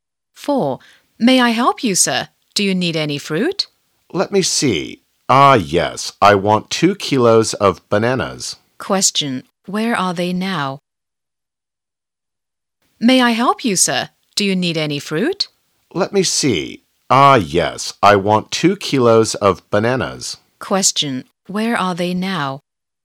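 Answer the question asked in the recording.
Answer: At a fruit shop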